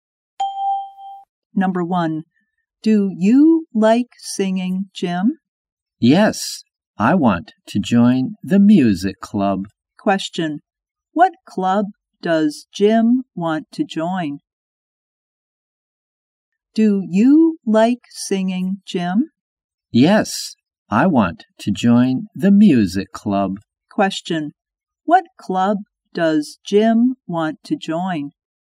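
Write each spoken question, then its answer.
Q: What club does Jim want to join?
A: The music club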